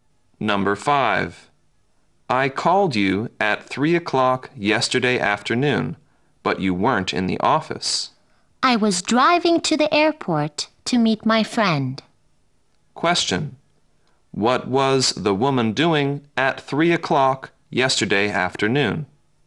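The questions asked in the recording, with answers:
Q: What was the woman doing at 3 o'clock yesterday afternoon?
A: Driving to the airport to meet her friend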